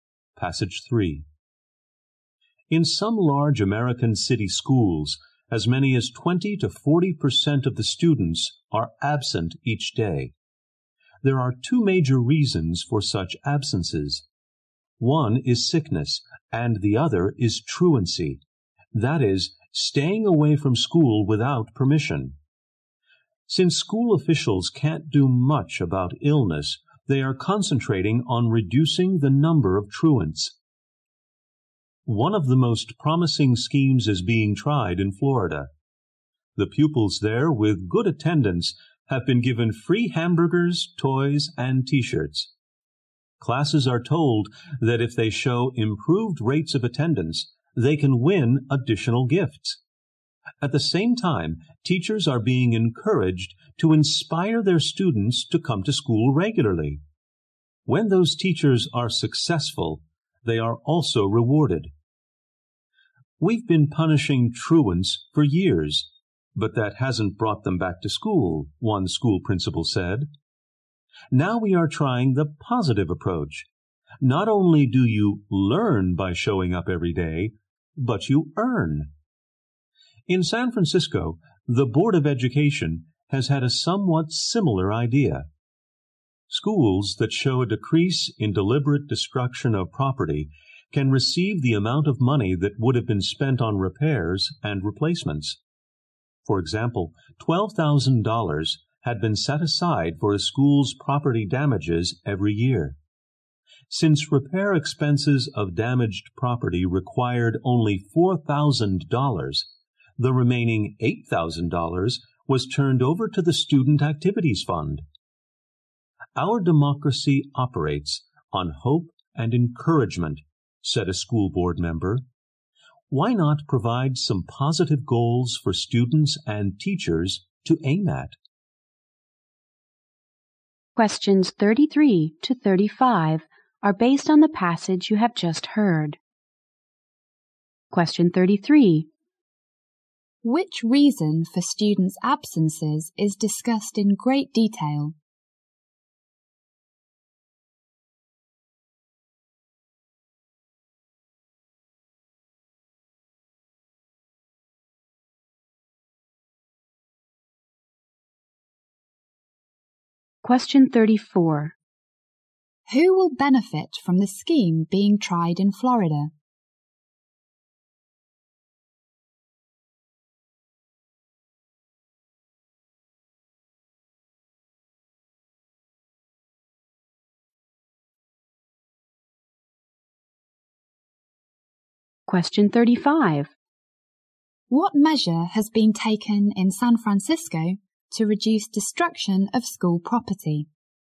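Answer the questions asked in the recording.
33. Truancy.
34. Both students and teachers.
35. Money saved on repairs is given to the school's Student Activities Fund.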